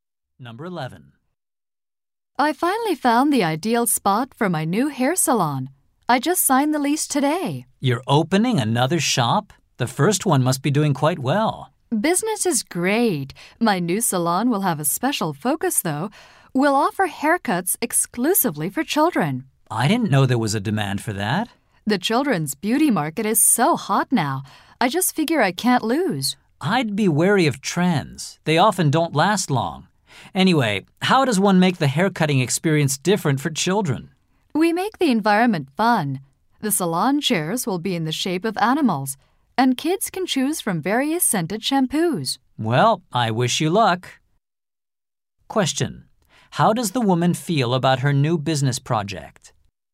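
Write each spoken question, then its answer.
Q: How does the woman feel about her new business project?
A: Confident it will succeed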